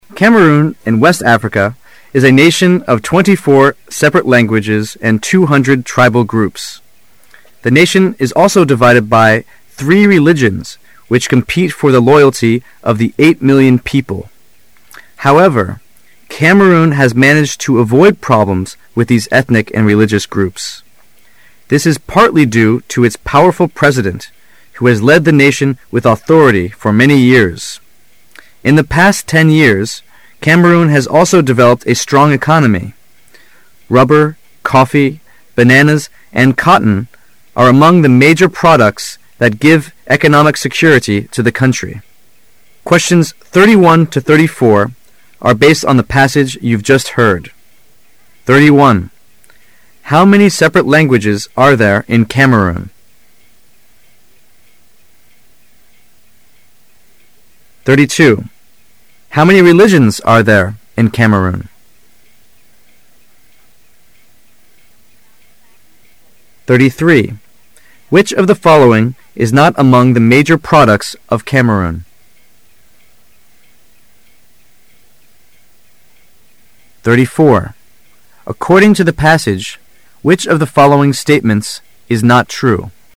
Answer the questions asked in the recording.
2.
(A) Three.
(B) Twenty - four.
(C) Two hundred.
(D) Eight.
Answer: (A) Three.
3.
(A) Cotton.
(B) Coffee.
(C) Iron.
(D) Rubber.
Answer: (C) Iron.
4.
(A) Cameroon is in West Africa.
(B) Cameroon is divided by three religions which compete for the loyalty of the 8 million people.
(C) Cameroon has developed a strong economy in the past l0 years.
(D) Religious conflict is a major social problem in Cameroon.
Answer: (D) Religious conflict is a major social problem in Cameroon.

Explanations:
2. 该题同样考查对数字的捕捉情况。而和religion同时出现的是数字three,因此选择选项A。
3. 注意提问中的否定副词not。而四个选项中只有Iron未提及,故应选择选项C。
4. 该题要求选出错误的评述。只有D项与全文主要思想不符,因此D为正确选项。

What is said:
[解析] 31-34 Cameroon in West Africa is a nation of 24 separate languages and 200 tribal groups. The nation is also divided by three religions which compete for the loyalty of the 8 million people. However, Cameroon has managed to avoid problems with these ethnic and religious groups. This is partly due to its powerful president who has led the nation with authority for many years. In the past l0 years, Cameroon has also developed a strong economy. Rubber, coffee, bananas, and cotton are among the major products that give economic security to the country. How many separate languages are there in Cameroon?